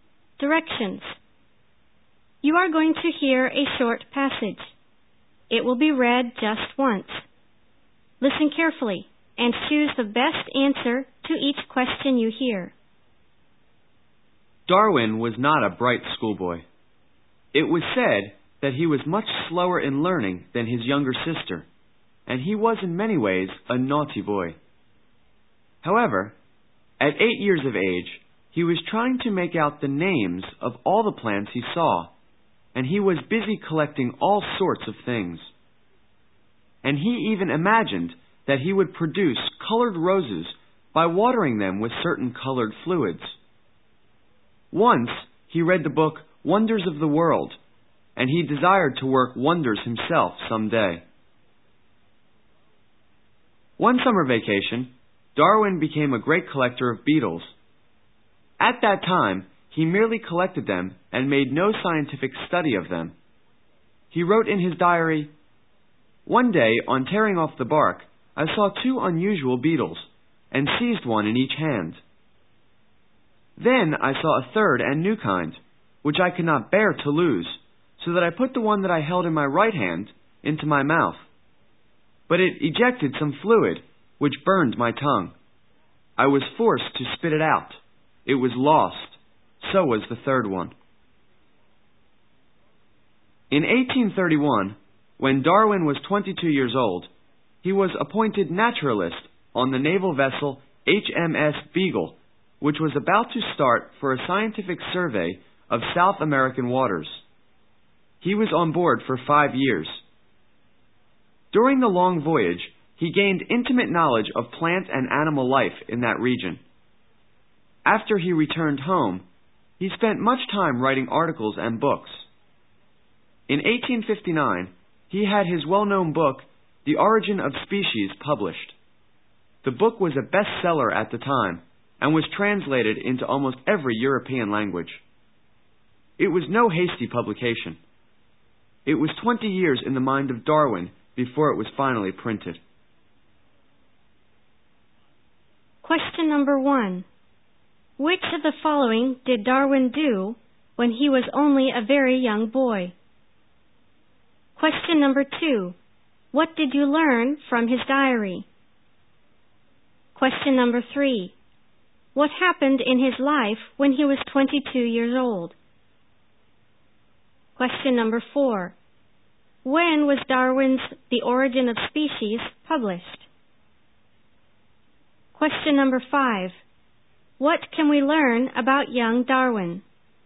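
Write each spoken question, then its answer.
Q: What happened in his life when he was 22 years old?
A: He was appointed naturalist on HMS Beagle

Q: When was Darwin's The Origin of Species published?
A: In 1859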